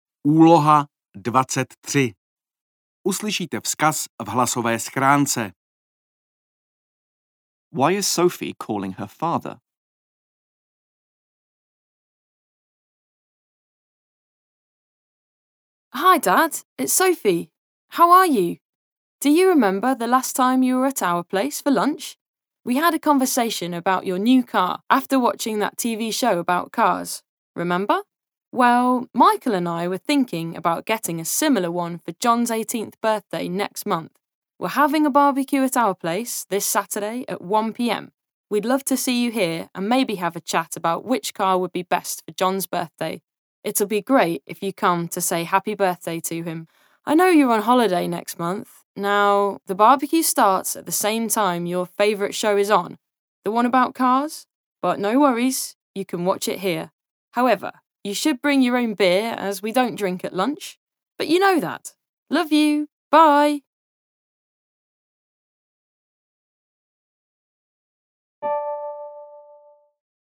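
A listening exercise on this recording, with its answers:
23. Why is Sophie calling her father?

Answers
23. to invite him to a barbecue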